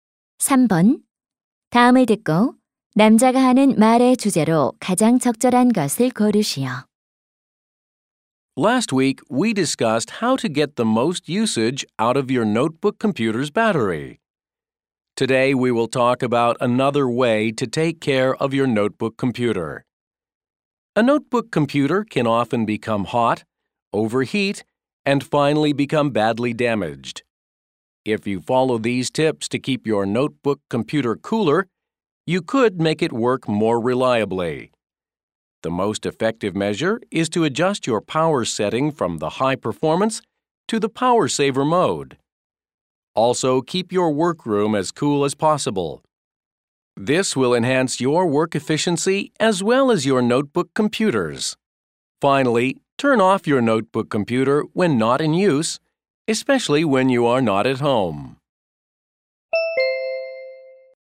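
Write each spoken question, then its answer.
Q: 다음을 듣고 남자가 하는 말의 주제로 가장 적절한 것을 고르시오.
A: 노트북 컴퓨터 과열을 막는 방법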